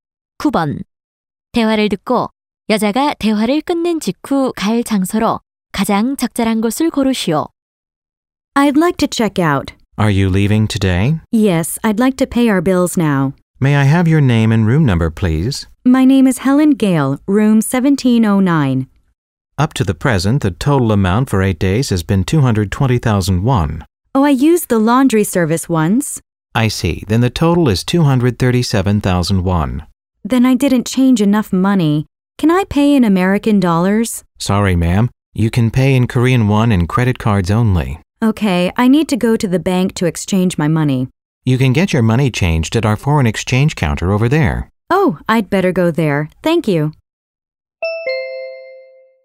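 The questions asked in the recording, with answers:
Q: 대화를 듣고 여자가 대화를 끝낸 직후 갈 장소로 가장 적절한 곳을 고르시오.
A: 호텔의 외환 창구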